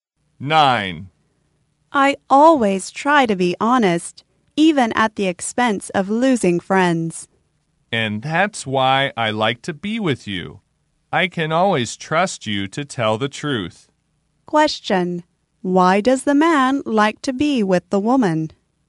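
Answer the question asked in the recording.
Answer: He can always trust her to tell the truth.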